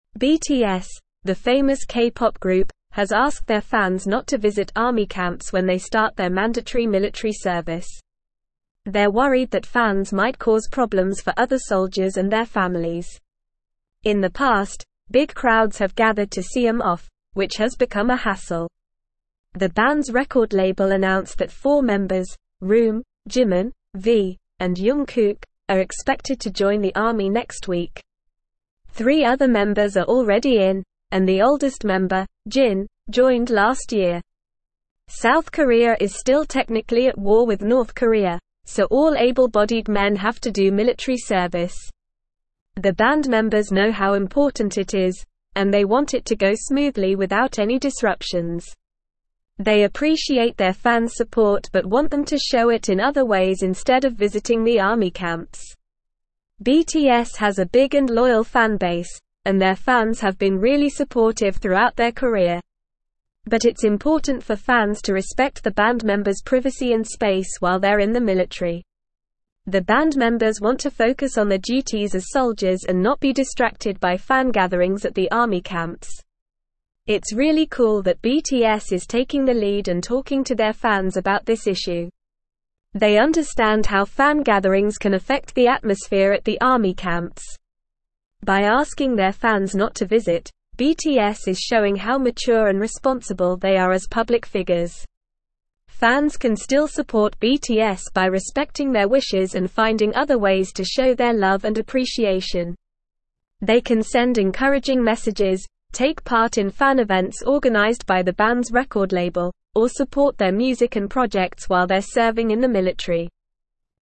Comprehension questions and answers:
Listen and Fill in the Gaps:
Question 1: They're (1)______ that fans might (2)______ problems for other (3)______ and their families.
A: worried

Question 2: They're (1)______ that fans might (2)______ problems for other (3)______ and their families.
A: cause

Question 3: They're (1)______ that fans might (2)______ problems for other (3)______ and their families.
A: soldiers

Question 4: The band's record label announced that four members, RM, (4)______, V, and Jung Kook, are expected to join the army next week.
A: Jimin

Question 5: Three other (5)______ are already in, and the oldest member, Jin, (6)______ last year.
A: members

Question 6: Three other (5)______ are already in, and the oldest member, Jin, (6)______ last year.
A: joined

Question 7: South Korea is still technically at war with North Korea, so all able-bodied men have to do military (7)______.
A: service

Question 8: BTS has a big and (8)______ fan base, and their fans have been really (9)______ throughout their career.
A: loyal

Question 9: BTS has a big and (8)______ fan base, and their fans have been really (9)______ throughout their career.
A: supportive

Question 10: The band members want to (10)______ on their duties as soldiers and not be distracted by fan gatherings at the army camps.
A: focus

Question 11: It's really cool that BTS is (11)______ the lead and talking to their fans about this (12)______.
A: taking

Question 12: It's really cool that BTS is (11)______ the lead and talking to their fans about this (12)______.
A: issue

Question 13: They understand how fan gatherings can affect the (13)______ at the army (14)______.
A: atmosphere

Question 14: They understand how fan gatherings can affect the (13)______ at the army (14)______.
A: camps

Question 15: They can send encouraging messages, take part in fan events organized by the band's (15)______ label, or support their music and (16)______ while they're serving in the military.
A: record

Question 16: They can send encouraging messages, take part in fan events organized by the band's (15)______ label, or support their music and (16)______ while they're serving in the military.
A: projects

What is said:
BTS, the famous K-pop group, has asked their fans not to visit army camps when they start their mandatory military service. They're worried that fans might cause problems for other soldiers and their families. In the past, big crowds have gathered to see them off, which has become a hassle. The band's record label announced that four members, RM, Jimin, V, and Jung Kook, are expected to join the army next week. Three other members are already in, and the oldest member, Jin, joined last year.
South Korea is still technically at war with North Korea, so all able-bodied men have to do military service. The band members know how important it is, and they want it to go smoothly without any disruptions. They appreciate their fans' support but want them to show it in other ways instead of visiting the army camps.
BTS has a big and loyal fan base, and their fans have been really supportive throughout their career. But it's important for fans to respect the band members' privacy and space while they're in the military. The band members want to focus on their duties as soldiers and not be distracted by fan gatherings at the army camps.
It's really cool that BTS is taking the lead and talking to their fans about this issue. They understand how fan gatherings can affect the atmosphere at the army camps. By asking their fans not to visit, BTS is showing how mature and responsible they are as public figures.
Fans can still support BTS by respecting their wishes and finding other ways to show their love and appreciation. They can send encouraging messages, take part in fan events organized by the band's record label, or support their music and projects while they're serving in the military.

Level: Level 3